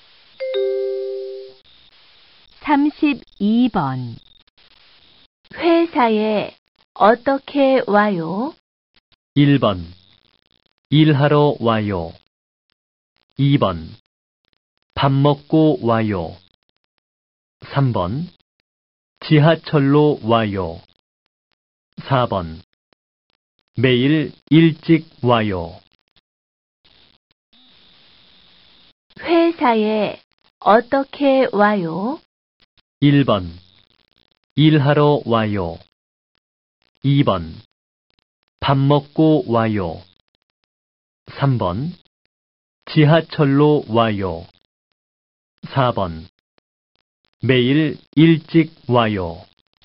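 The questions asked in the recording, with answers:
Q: 회사에 어떻게 와요?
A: 3: 지하철로 와요.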